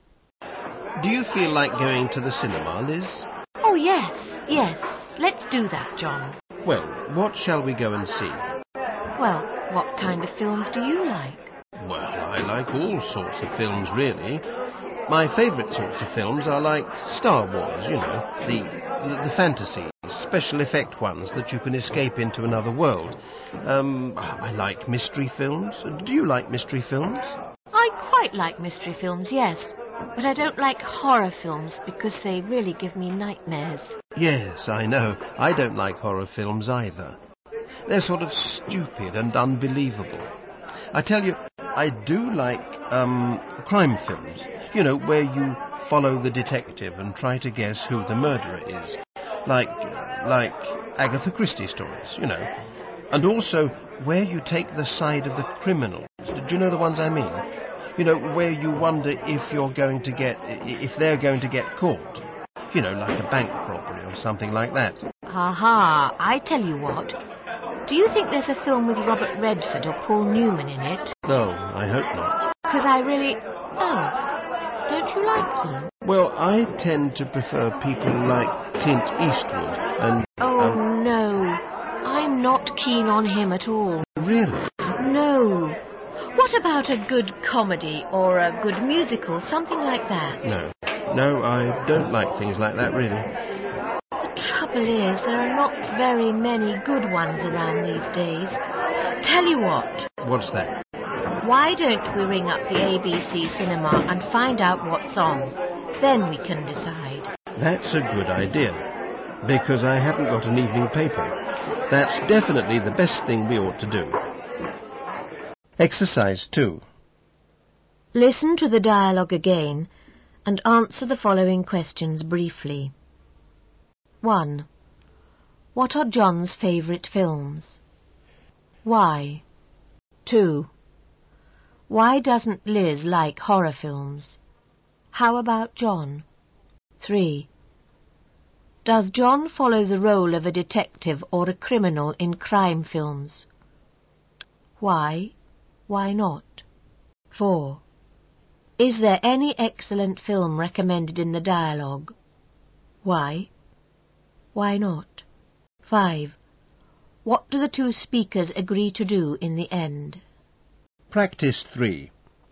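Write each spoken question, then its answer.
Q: Is there any excellent film recommended in the dialogue?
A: No, there are not many good ones around these days

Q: What do the two speakers agree to do in the end?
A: Ring up the ABC cinema to find out what's on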